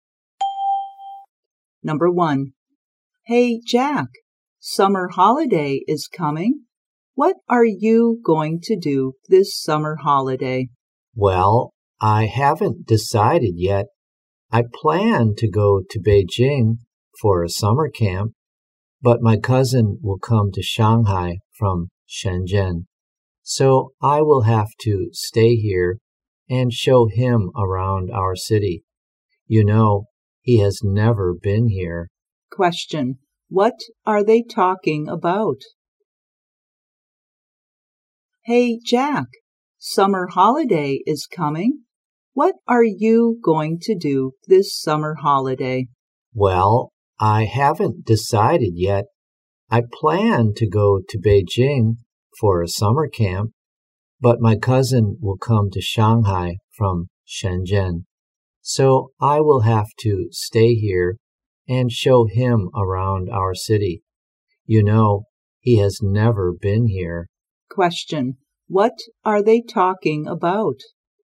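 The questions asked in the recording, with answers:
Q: What are they talking about?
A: Their plans for the summer holiday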